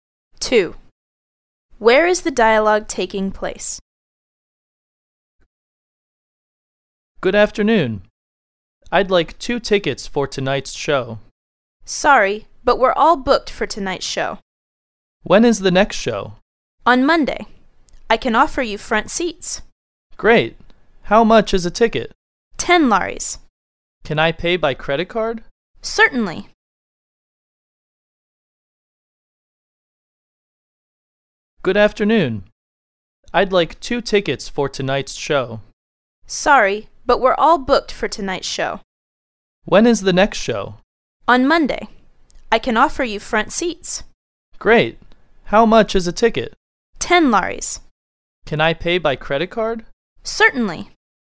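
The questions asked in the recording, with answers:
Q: Where is the dialogue taking place?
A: At a theatre box office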